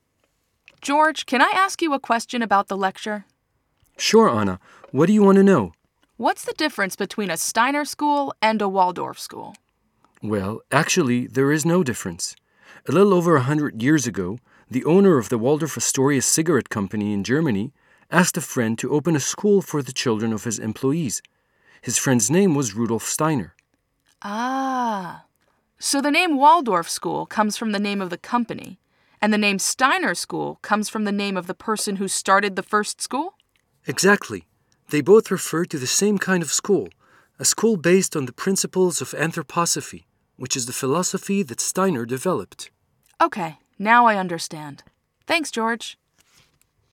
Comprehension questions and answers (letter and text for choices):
George tells Anna that -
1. Steiner schools are still very popular today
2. the first Waldorf school was in a cigarette factory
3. the first Waldorf school was opened long before the first Steiner school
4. Waldorf schools and Steiner schools are different names for the same thing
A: 4. Waldorf schools and Steiner schools are different names for the same thing